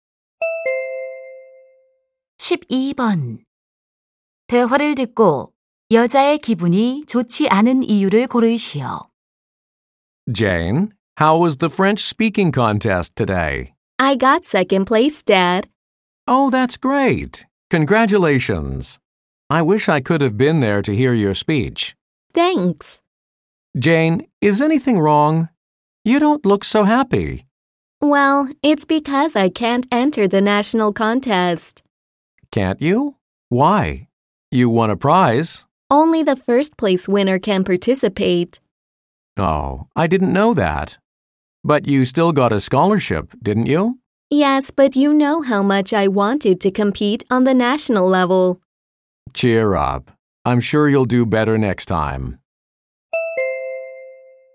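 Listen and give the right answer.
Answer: 전국 대회에 참가할 수 없어서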